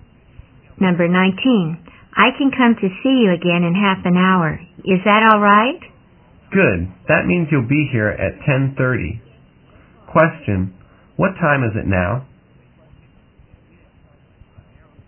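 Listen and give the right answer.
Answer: 10:00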